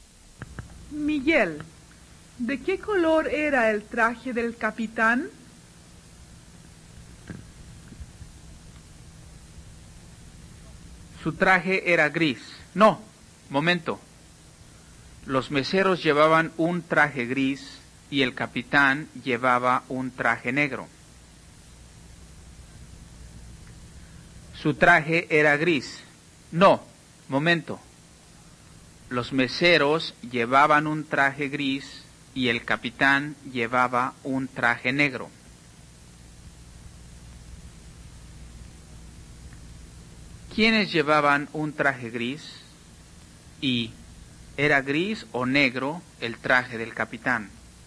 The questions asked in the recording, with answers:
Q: ¿Quiénes llevaban un traje gris?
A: Los meseros llevaban un traje gris.

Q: ¿Y era gris o negro el traje del capitán?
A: El traje del capitán era negro.